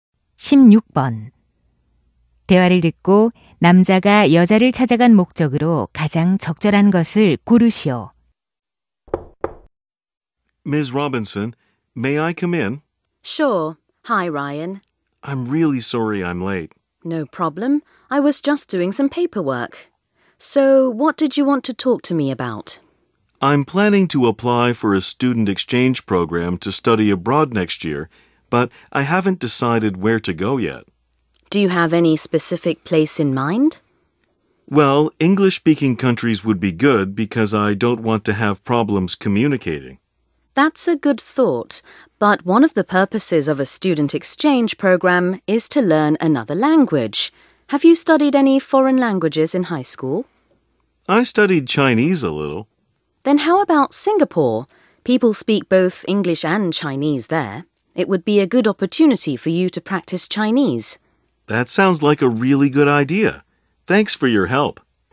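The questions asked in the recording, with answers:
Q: 대화를 듣고 남자가 여자를 찾아간 목적으로 가장 적절한 것을 고르시오.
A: 교환학생으로 갈 나라에 대한 조언을 구하려고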